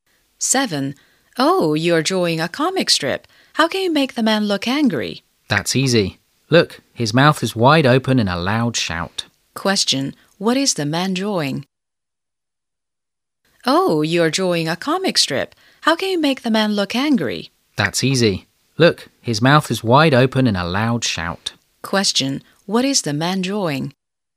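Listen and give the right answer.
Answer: A comic strip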